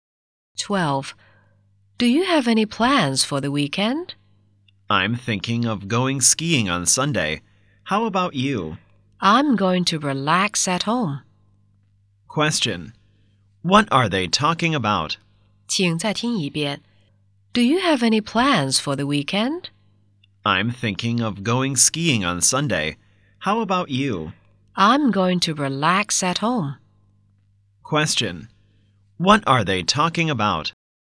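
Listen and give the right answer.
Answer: Their weekend plans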